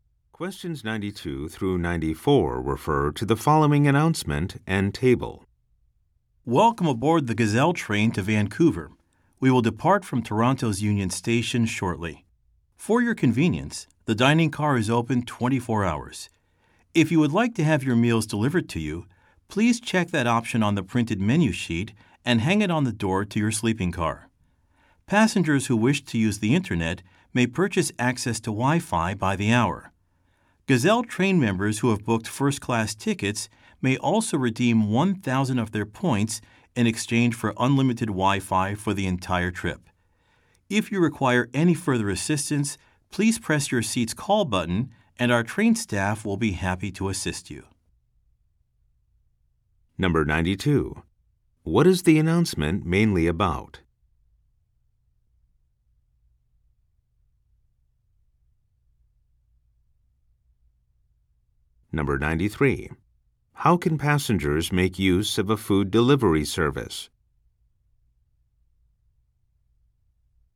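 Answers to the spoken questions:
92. Services on the train
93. Check the option on the menu sheet and hang it on their door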